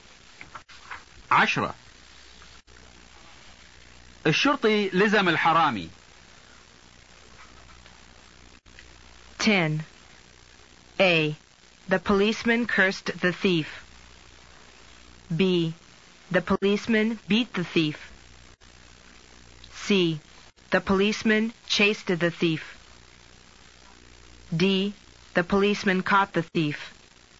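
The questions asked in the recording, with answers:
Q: الشرطي لزم الحرامي.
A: D: The policeman caught the thief.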